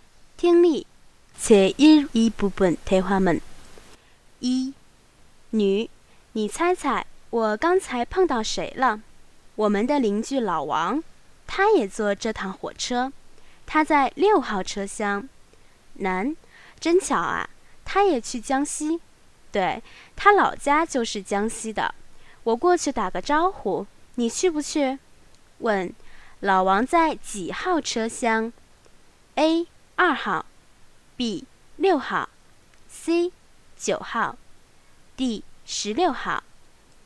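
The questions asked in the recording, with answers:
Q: 问,老王在几号车厢?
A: B: 六号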